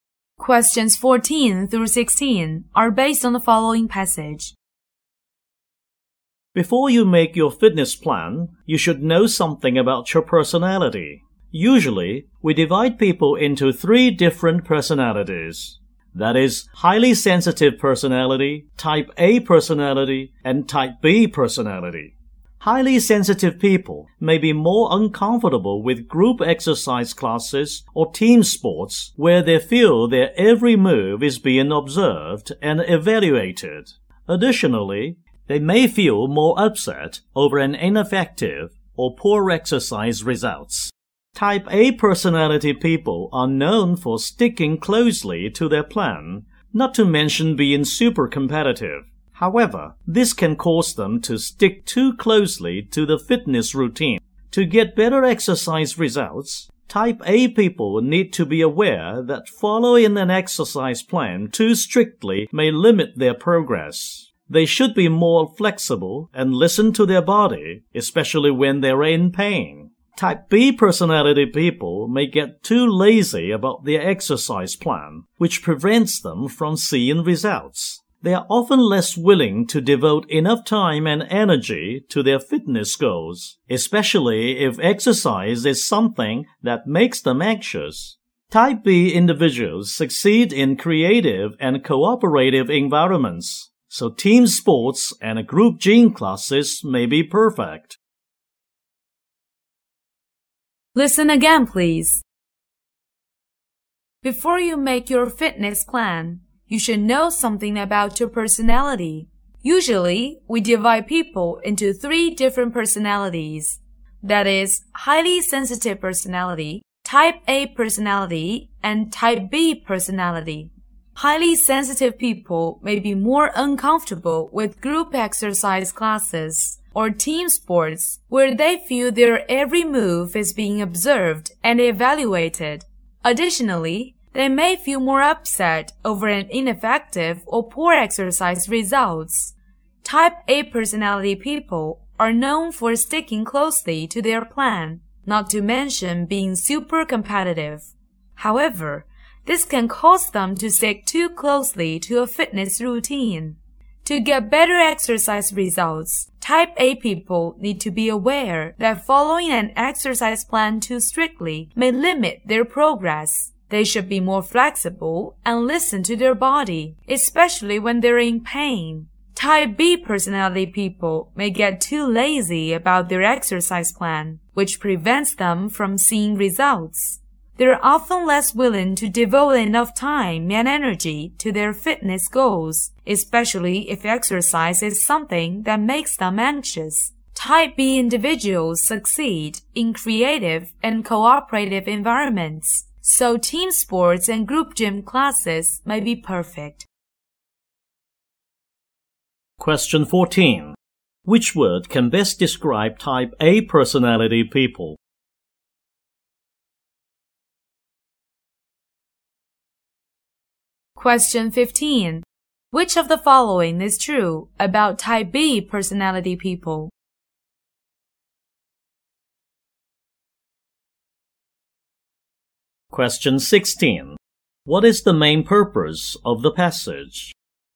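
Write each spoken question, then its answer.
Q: Which word can best describe type A personality people?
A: Competitive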